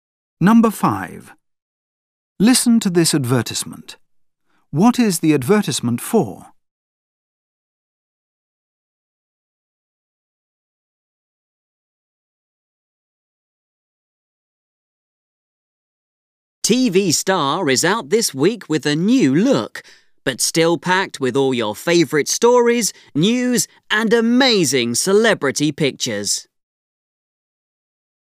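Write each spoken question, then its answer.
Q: What is the advertisement for?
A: A magazine (TV Star)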